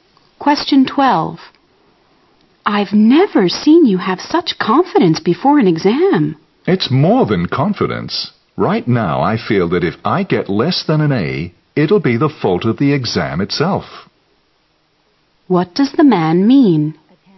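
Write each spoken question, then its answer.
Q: What does the man mean?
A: He is fully prepared and sure he will get an A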